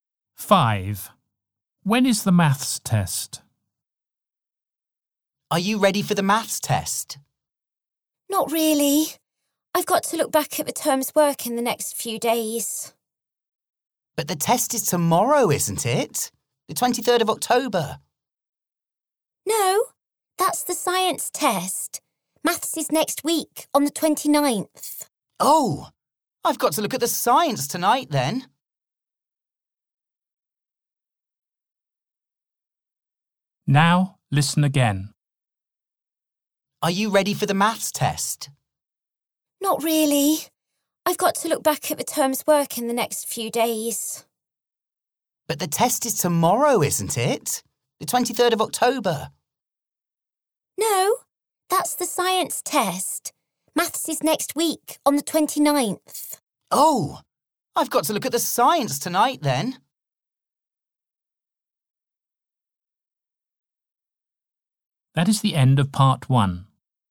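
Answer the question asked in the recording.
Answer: On the 29th (of October), next week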